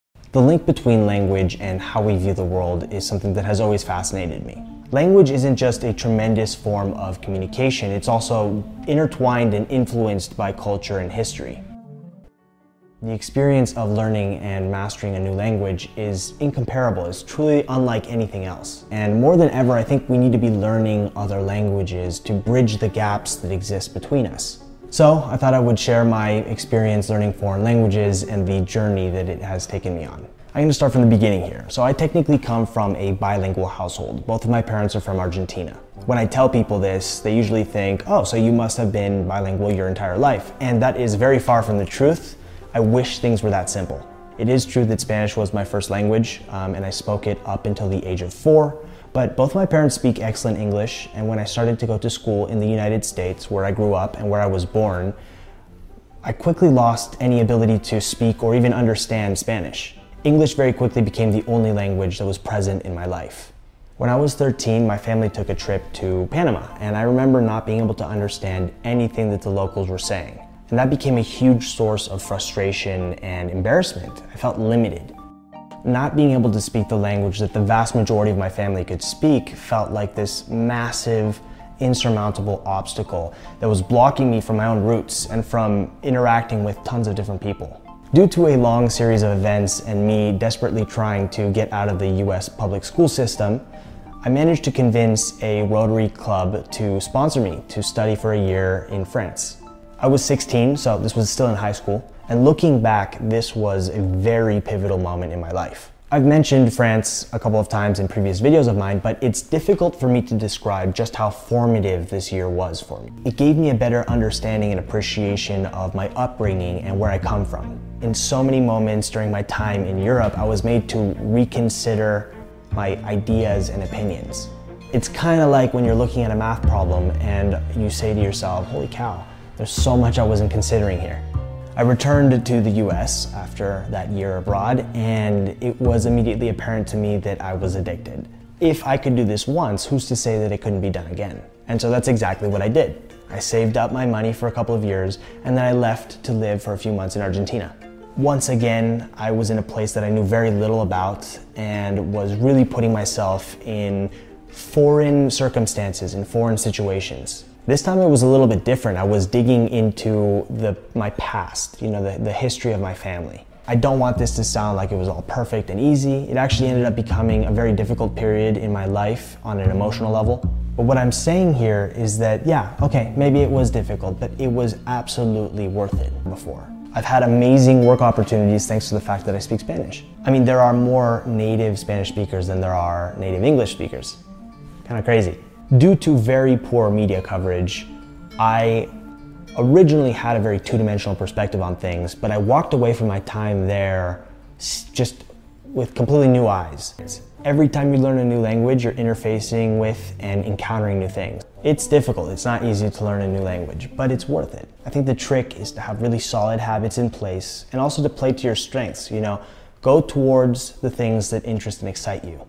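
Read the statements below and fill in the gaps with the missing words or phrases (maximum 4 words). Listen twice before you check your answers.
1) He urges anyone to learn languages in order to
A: bridge the gaps

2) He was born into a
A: bilingual household

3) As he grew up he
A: lost any ability

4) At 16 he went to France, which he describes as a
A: pivotal

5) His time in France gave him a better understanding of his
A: upbringing

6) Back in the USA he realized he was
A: addicted

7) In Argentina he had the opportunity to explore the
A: history

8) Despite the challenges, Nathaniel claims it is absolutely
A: worth it

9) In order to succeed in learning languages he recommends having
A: solid habits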